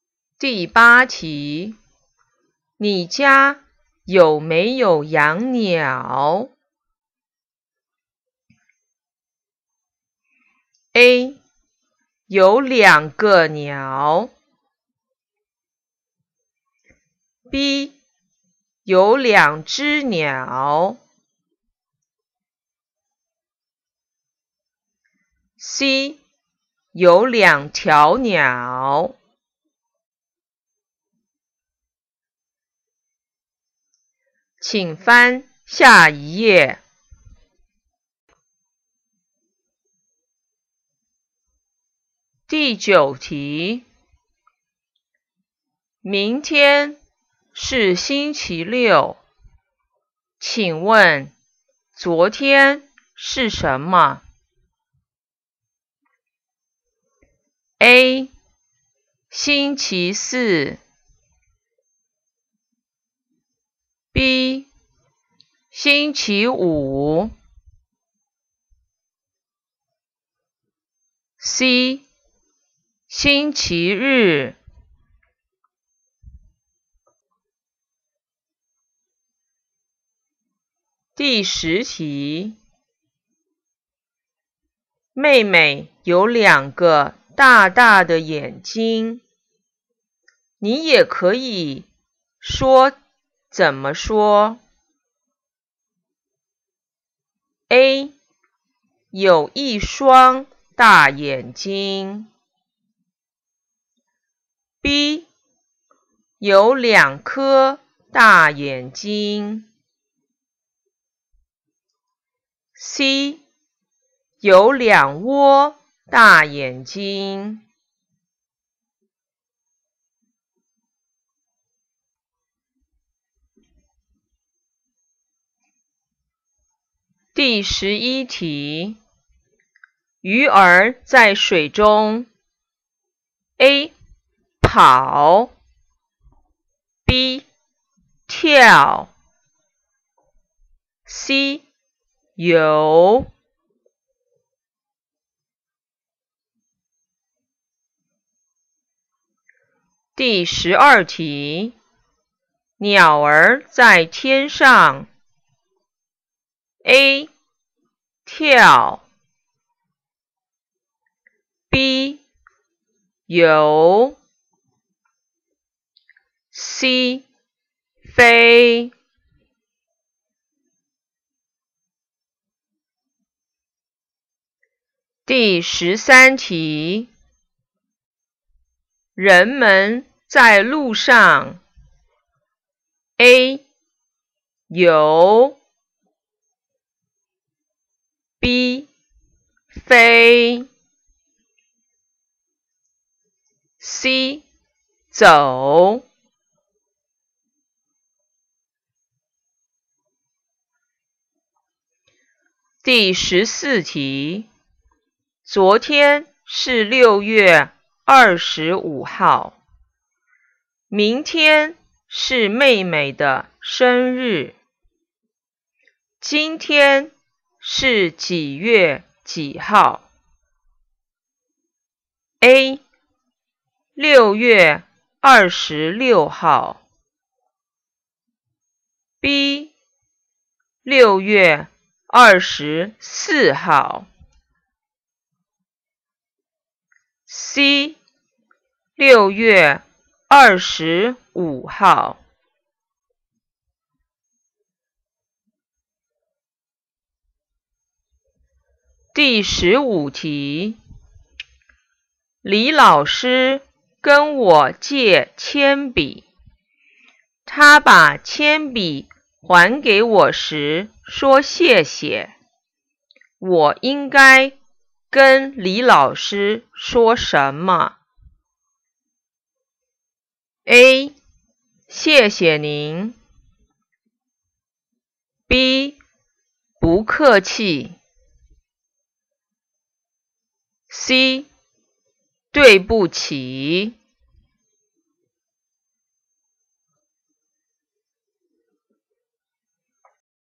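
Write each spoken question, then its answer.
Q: 你家有没有养鸟?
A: B: 有两只鸟

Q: 明天是星期六,请问昨天是什么?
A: A: 星期四

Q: 妹妹有两个大大的眼睛,你也可以说怎么说?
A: A: 有一双大眼睛

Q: 鱼儿在水中。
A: C: 游

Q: 鸟儿在天上。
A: C: 飞

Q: 人们在路上。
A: C: 走

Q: 昨天是六月二十五号,明天是妹妹的生日,今天是几月几号?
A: A: 六月二十六号

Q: 李老师跟我借铅笔,他把铅笔还给我时说谢谢,我应该跟李老师说什么?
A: B: 不客气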